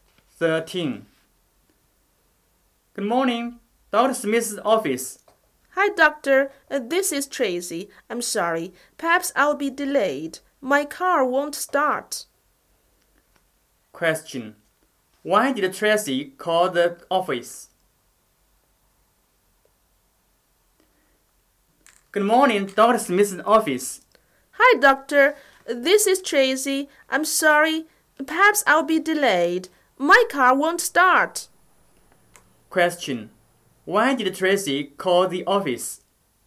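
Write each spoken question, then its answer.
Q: Why did Tracy call the office?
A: To say she'll be late because her car won't start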